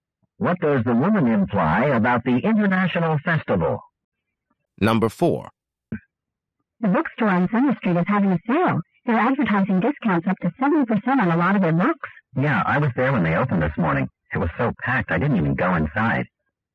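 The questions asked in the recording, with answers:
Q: What does the man mean?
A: The store was too crowded, so he didn't go in.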